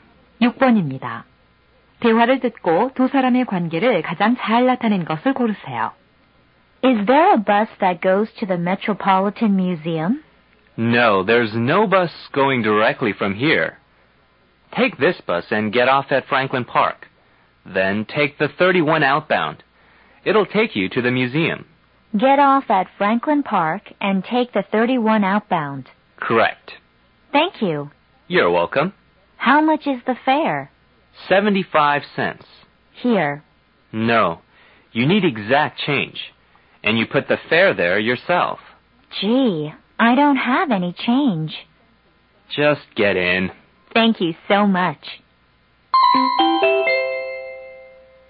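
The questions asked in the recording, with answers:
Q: 대화를 듣고 두 사람의 관계를 가장 잘 나타낸 것을 고르세요.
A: 버스 기사와 승객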